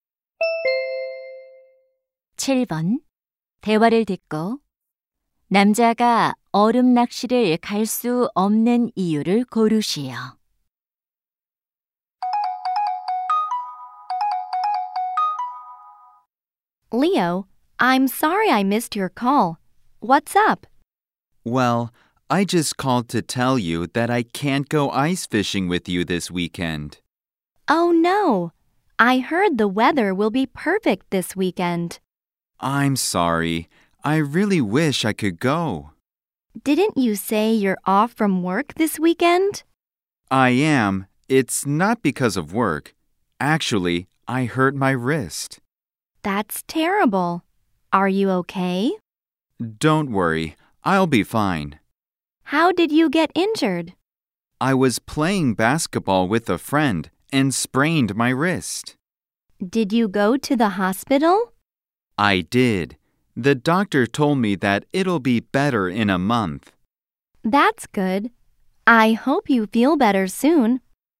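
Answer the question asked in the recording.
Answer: 손목을 다쳐서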